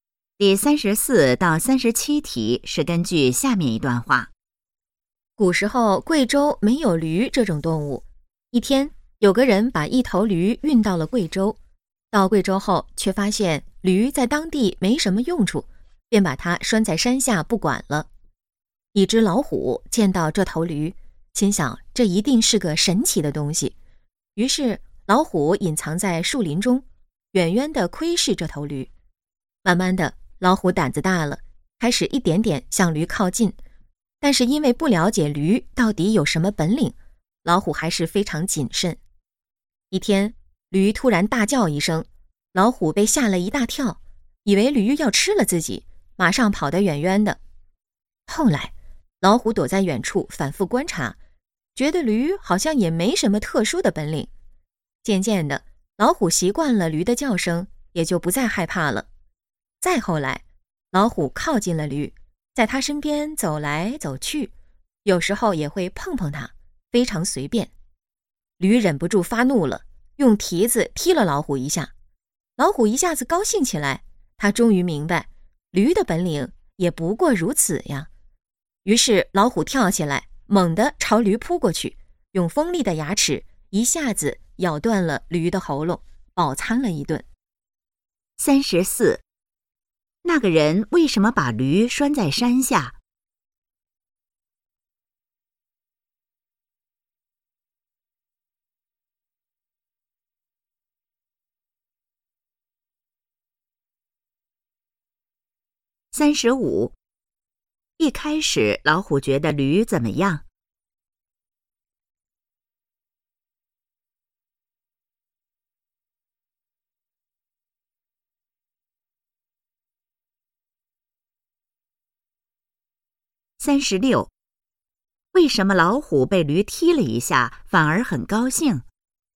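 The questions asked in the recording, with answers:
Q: 那个人为什么把驴拴在山下?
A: 驴在当地没什么用处

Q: 一开始老虎觉得驴怎么样?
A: 是个神奇的东西

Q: 为什么老虎被驴踢了一下反而很高兴?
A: 明白了驴的本领不过如此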